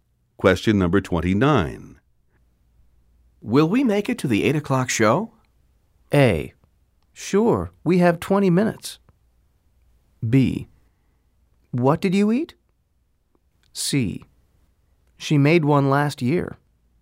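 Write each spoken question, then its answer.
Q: Will we make it to the 8 o'clock show?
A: A: Sure, we have 20 minutes.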